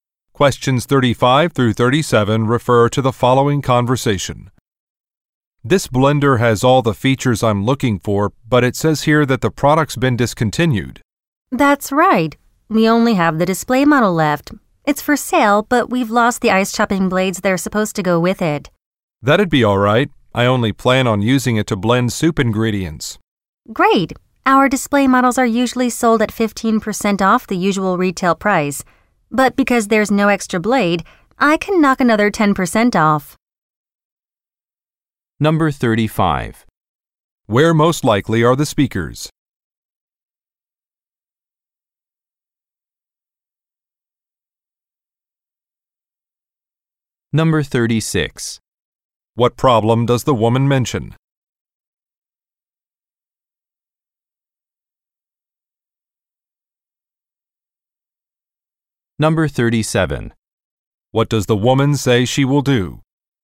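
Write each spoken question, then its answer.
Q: Where most likely are the speakers?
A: In an appliance store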